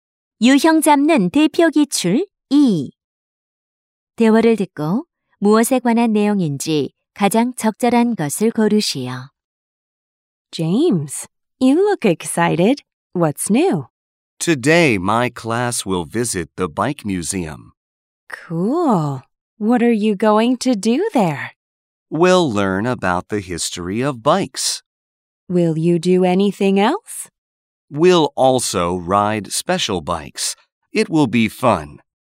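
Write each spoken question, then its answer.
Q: 대화를 듣고 무엇에 관한 내용인지 가장 적절한 것을 고르시오.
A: 자전거 박물관 견학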